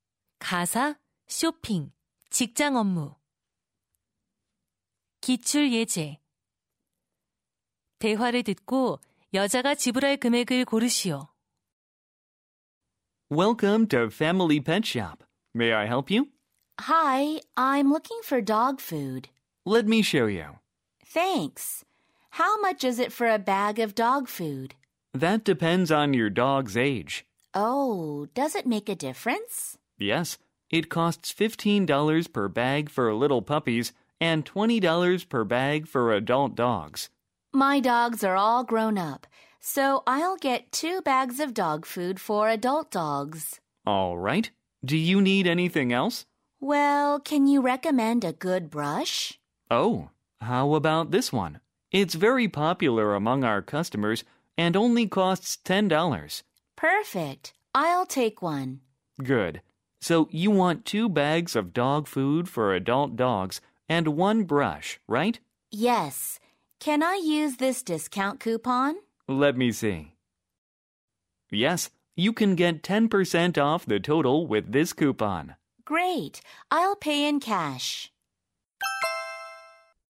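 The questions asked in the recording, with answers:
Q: 대화를 듣고 여자가 지불할 금액을 고르시오.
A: $45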